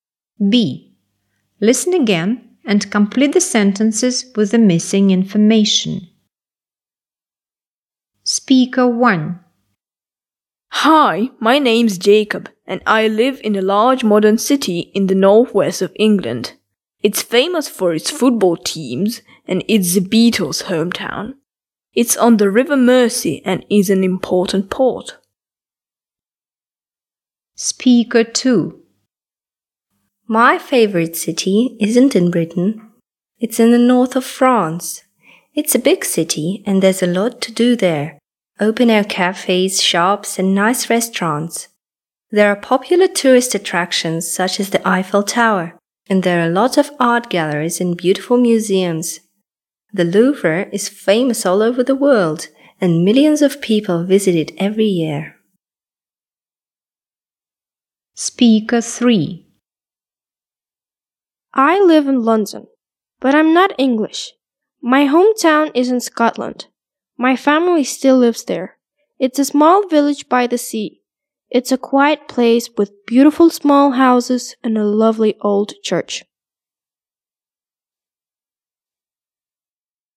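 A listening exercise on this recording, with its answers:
B. Listen again and complete the sentences with the missing information:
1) He lives in a large (1) city.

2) It's famous for (2) teams.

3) Her favourite city is in (3)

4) She is from (4)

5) Her village is near the (5)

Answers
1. modern
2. football
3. France
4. Scotland
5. sea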